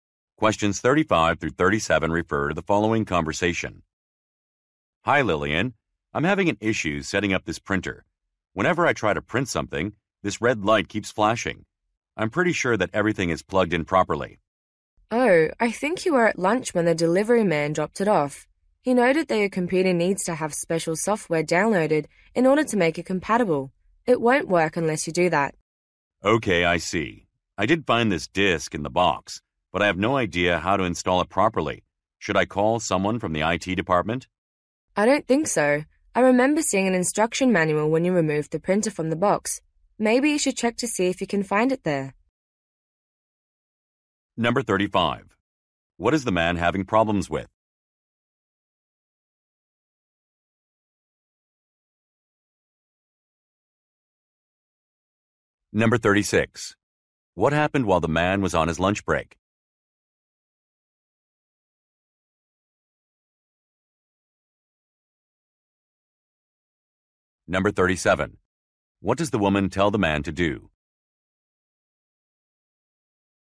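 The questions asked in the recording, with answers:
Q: What is the man having problems with?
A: Setting up a printer

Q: What happened while the man was on his lunch break?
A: The printer was delivered

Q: What does the woman tell the man to do?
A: Look for the instruction manual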